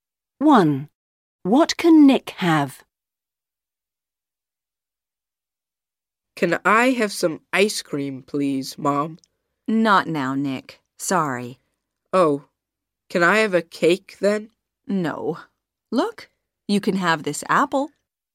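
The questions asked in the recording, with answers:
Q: What can Nick have?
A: an apple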